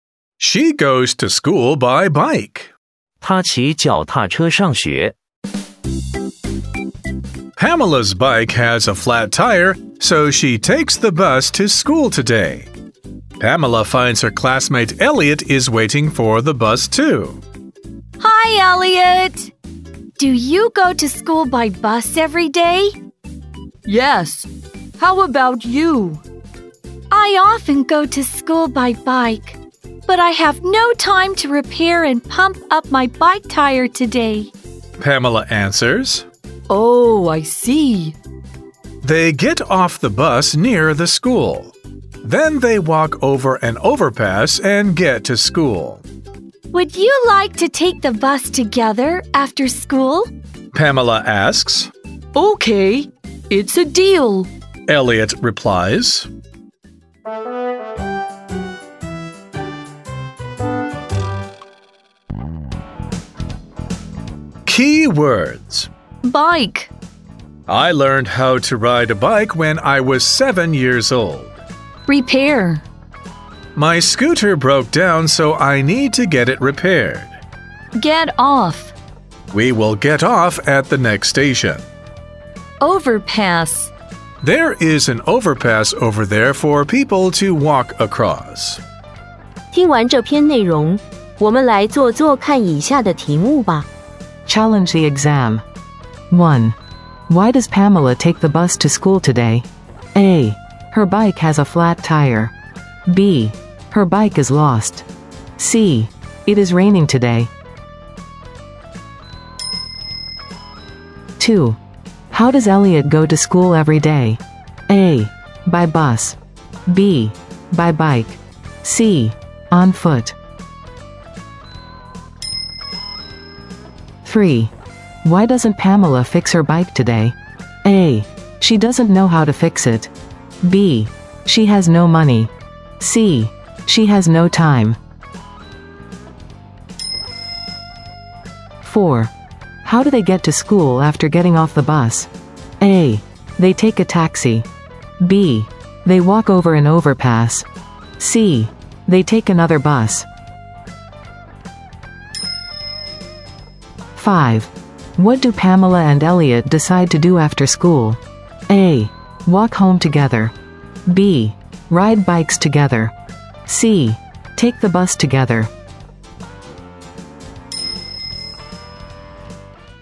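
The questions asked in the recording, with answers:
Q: Why does Pamela take the bus to school today?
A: A: Her bike has a flat tire.

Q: How does Elliot go to school every day?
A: A: By bus.

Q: Why doesn't Pamela fix her bike today?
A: C: She has no time.

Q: How do they get to school after getting off the bus?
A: B: They walk over an overpass.

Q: What do Pamela and Elliot decide to do after school?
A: C: Take the bus together.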